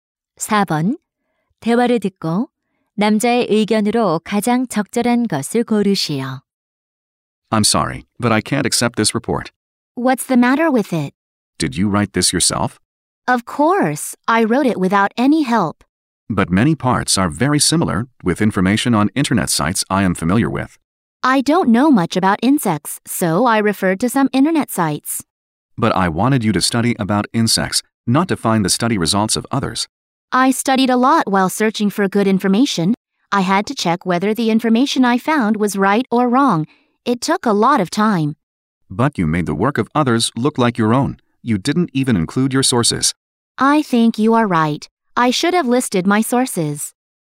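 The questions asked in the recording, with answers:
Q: 대화를 듣고 남자의 의견으로 가장 적절한 것을 고르시오.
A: 다른 사람의 자료를 자기 것처럼 쓰면 안 되고 출처를 밝혀야 한다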